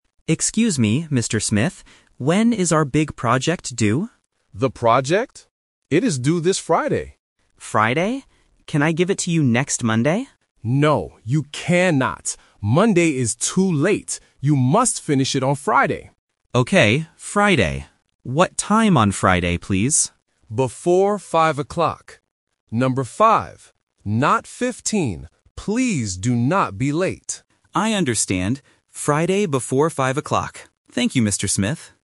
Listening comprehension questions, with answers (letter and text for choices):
Listen to the conversation between a student and a teacher. Choose the correct answer (A, B, or C) for each question.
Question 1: What are they talking about?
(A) A test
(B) A book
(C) A project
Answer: (C) A project

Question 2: What day is the deadline?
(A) Thursday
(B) Friday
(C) Monday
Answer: (B) Friday

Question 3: What time must the student finish it?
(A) Before 5 o'clock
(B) Before 15 o'clock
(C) Before 4 o'clock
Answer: (A) Before 5 o'clock

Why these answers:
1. The student asks, "When is our big project due?" Option A (A test) and Option B (A book) are common school items, but they are not mentioned in this conversation.
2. The teacher says clearly, "It is due this Friday". Option C (Monday) is the main trap because the student asks, "Can I give it to you next Monday?", but the teacher explicitly says, "No... Monday is too late." Option A (Thursday) is not mentioned.
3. The teacher says the deadline is "Before 5 o'clock" and confirms with "Number five." Option B (15 o'clock) is a phonetic trap, and the teacher even warns, "Not 15," to help A1 learners distinguish the sounds. Option C (4 o'clock) is a plausible time but is never mentioned.